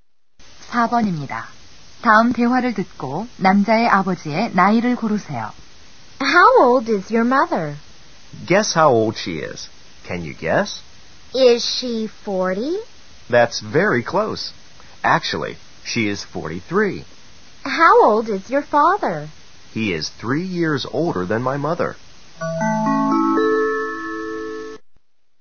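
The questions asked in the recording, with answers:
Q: 다음 대화를 듣고 남자의 아버지의 나이를 고르세요.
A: 46세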